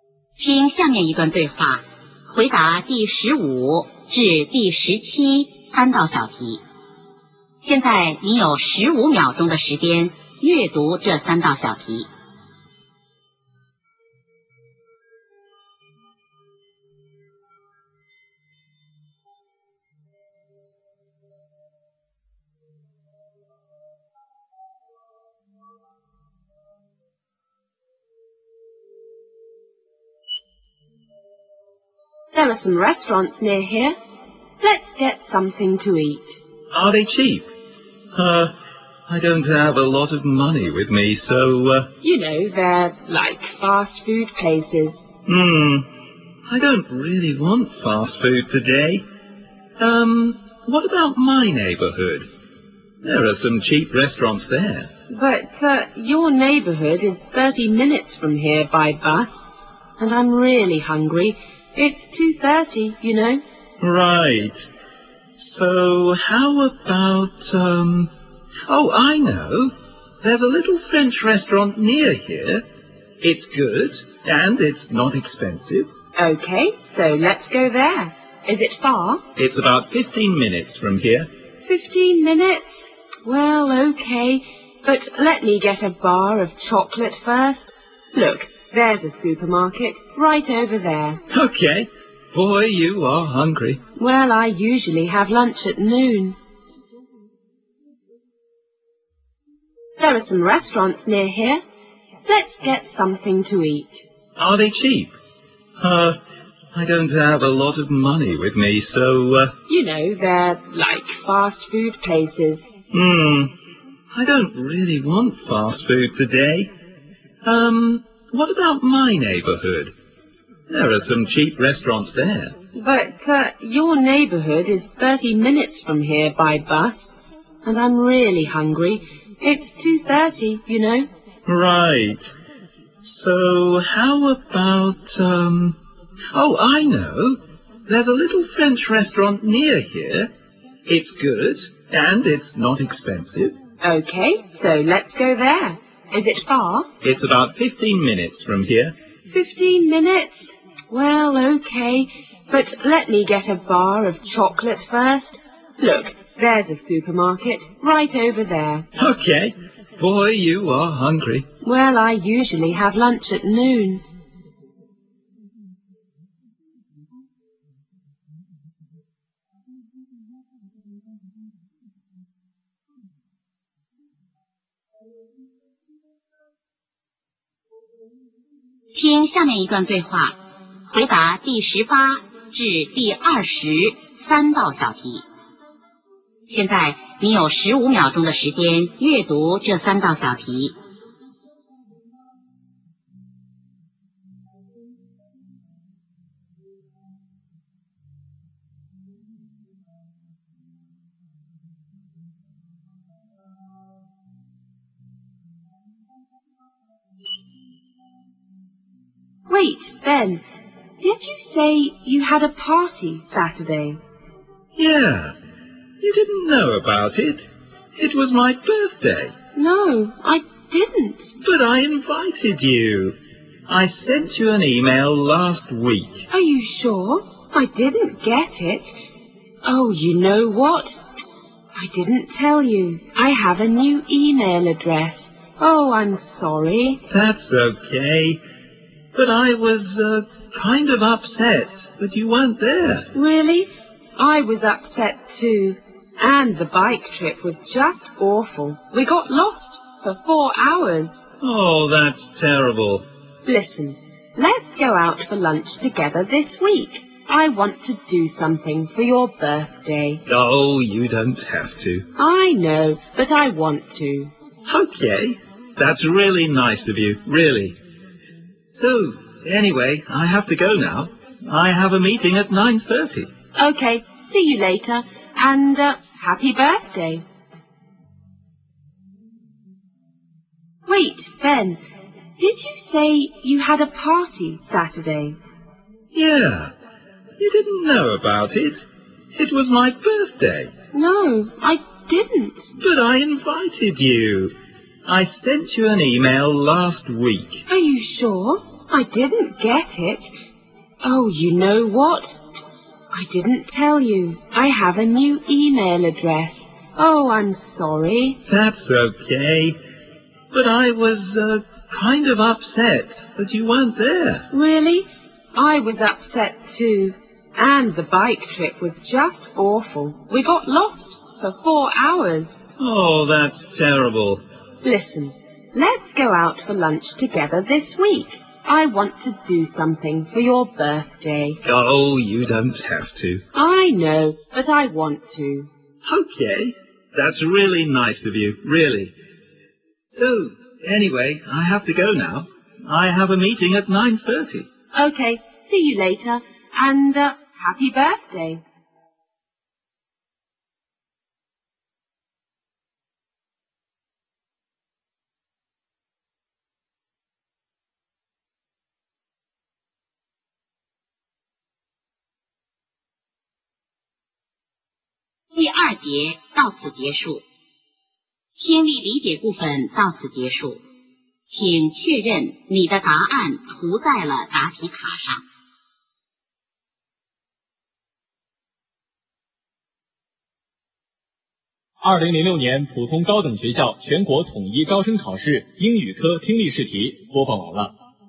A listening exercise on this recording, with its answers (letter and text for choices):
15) What are they discussing?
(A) What to have for lunch.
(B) Where to go for lunch.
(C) When to have lunch.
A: (B) Where to go for lunch.

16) What can we learn about the man?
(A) He usually doesn't eat fast food.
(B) He often eats in a restaurant near his home.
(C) He can't afford an expensive lunch that day.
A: (C) He can't afford an expensive lunch that day.

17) Where are they probably going right after this conversation?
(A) A supermarket.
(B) A Fast-food place.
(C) A French restaurant.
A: (A) A supermarket.

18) Why didn't the woman go to the man's birthday party?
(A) She forgot all about it.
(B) She didn't like the man.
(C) She didn't know about it.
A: (C) She didn't know about it.

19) Who is the woman?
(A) The man's friend.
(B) The man's mother.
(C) The man's secretary.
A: (A) The man's friend.

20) What does the woman want to do for the man's birthday?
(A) Buy him a nice present.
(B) Have lunch with him.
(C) Send him an email.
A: (B) Have lunch with him.

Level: 高考